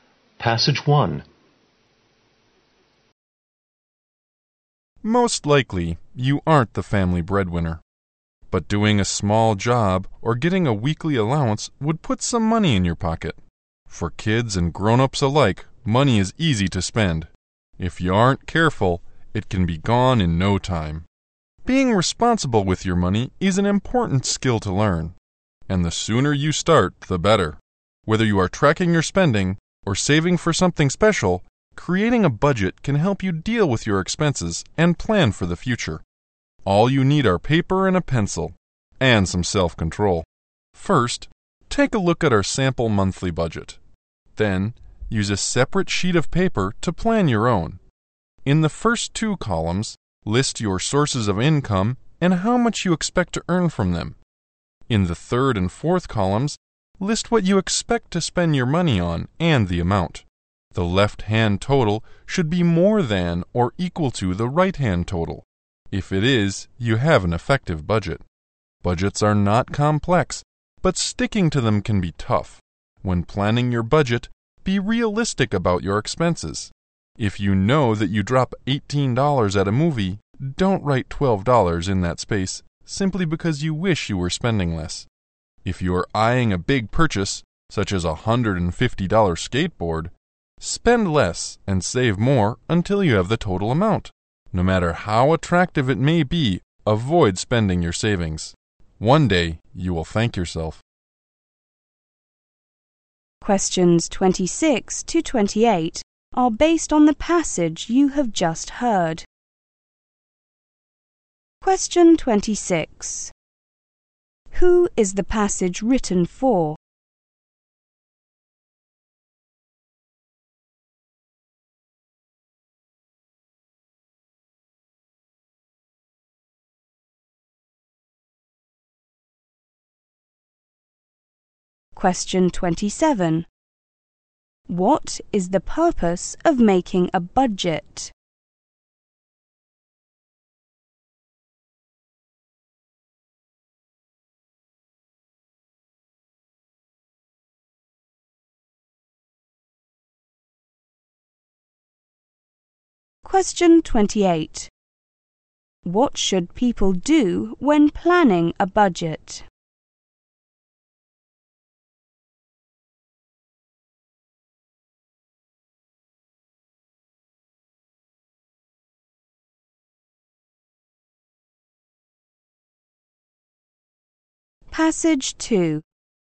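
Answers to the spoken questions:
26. Kids.
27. To deal with expenses and plan for the future.
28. Be realistic about their expenses.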